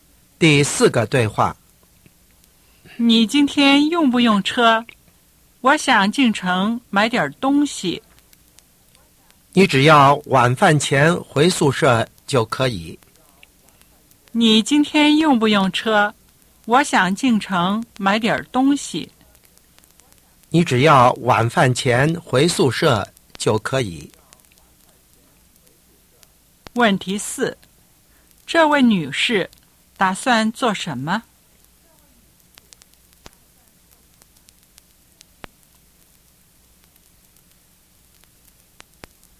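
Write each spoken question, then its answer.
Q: 这位女士打算做什么?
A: 借车进城买东西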